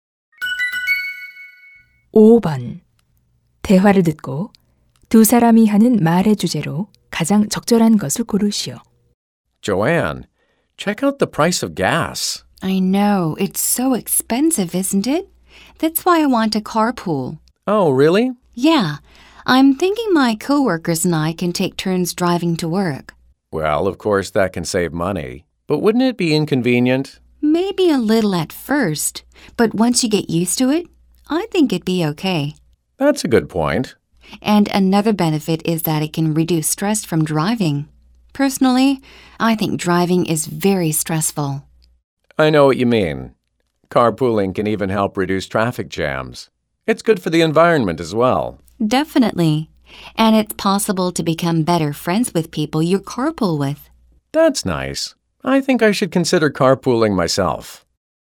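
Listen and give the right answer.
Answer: 카풀의 장점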